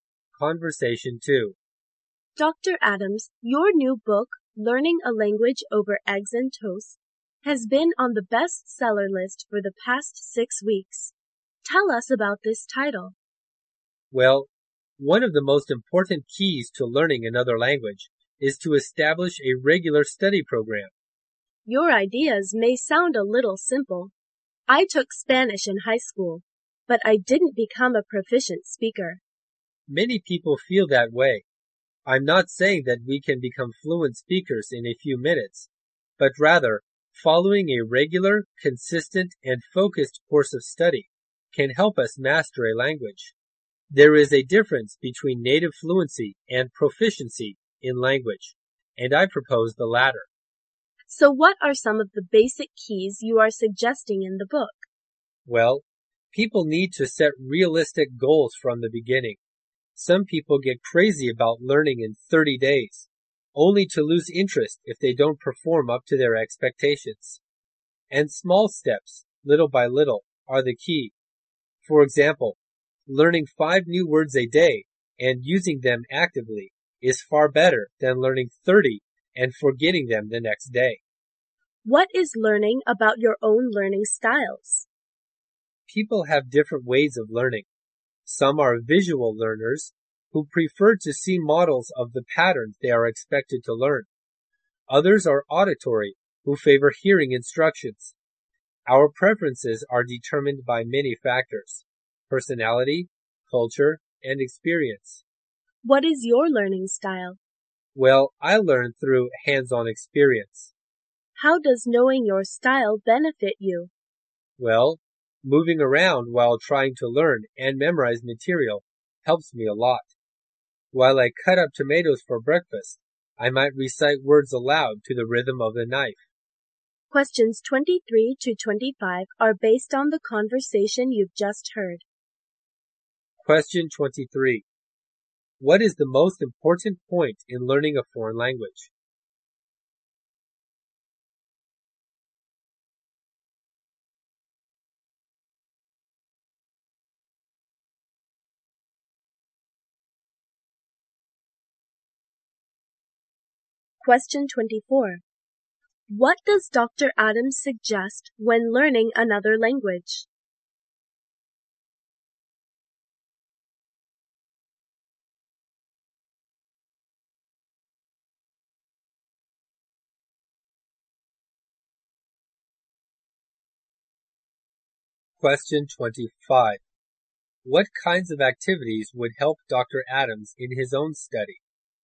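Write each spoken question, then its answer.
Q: What is the most important point in learning a foreign language?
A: Establishing a regular study program

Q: Adams suggest when learning another language?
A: Set realistic goals and learn in small steps

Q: What kinds of activities would help Dr.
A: Hands-on activities, moving around while learning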